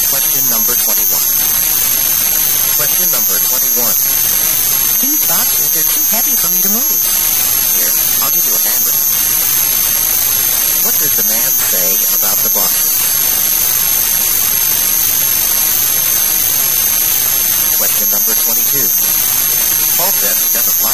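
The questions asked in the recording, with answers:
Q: What does the man say about the boxes?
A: He'll help her move them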